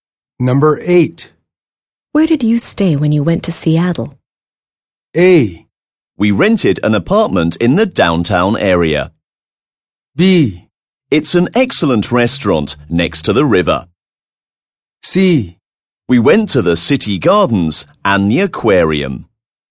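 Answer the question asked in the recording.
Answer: A: We rented an apartment in the downtown area.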